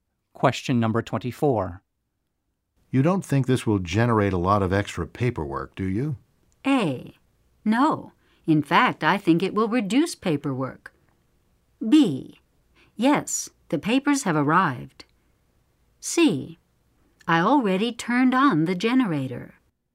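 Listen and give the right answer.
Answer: A: No. In fact, I think it will reduce paperwork.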